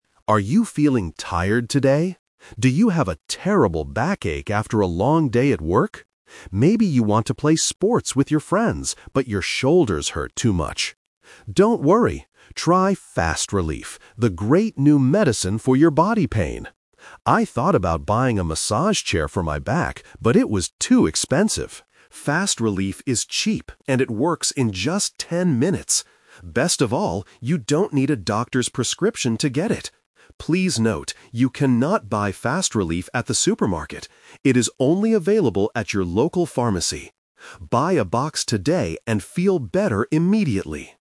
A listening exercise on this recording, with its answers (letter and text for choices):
Listen to the radio advertisement. Choose the correct answer (A, B, or C) for each question.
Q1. What health problem does the medicine help with?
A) A bad stomachache.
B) A backache and shoulder pain.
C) A high fever and a cold.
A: B) A backache and shoulder pain.

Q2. What did the speaker think about buying before?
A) A massage chair.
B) Some cheap medicine.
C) A new bed for sleeping.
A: A) A massage chair.

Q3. Where can people buy "FastRelief"?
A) At the supermarket.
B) At the doctor's clinic.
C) At the local pharmacy.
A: C) At the local pharmacy.

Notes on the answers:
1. The announcer asks, "Do you have a terrible backache...?" and mentions "your shoulders hurt too much." FastRelief is for this pain. Trap A is wrong: A stomachache is a different health problem not mentioned in the audio. Trap C is wrong: Fever and cold are common illnesses, but they are not mentioned in this advertisement.
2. The announcer says, "I thought about buying a massage chair for my back, but it was too expensive." Trap B is wrong: FastRelief is the "cheap" medicine, but the speaker didn't think about buying a different cheap medicine before. Trap C is wrong: A new bed is a plausible idea for back pain, but it is never mentioned.
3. The announcer explicitly states, "It is only available at your local pharmacy." Trap A is wrong (Location Trap): The audio mentions the supermarket, but says "you cannot buy FastRelief at the supermarket." Trap B is wrong: The announcer says "you don't need a doctor's prescription", meaning you don't have to go to the clinic to get a paper for it.

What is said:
Announcer: Are you feeling tired today? Do you have a terrible backache after a long day at work? Maybe you want to play sports with your friends, but your shoulders hurt too much.
Don't worry! Try "FastRelief", the great new medicine for your body pain. I thought about buying a massage chair for my back, but it was too expensive. FastRelief is cheap and it works in just ten minutes. Best of all, you don't need a doctor's prescription to get it.
Please note, you cannot buy FastRelief at the supermarket. It is only available at your local pharmacy. Buy a box today and feel better immediately!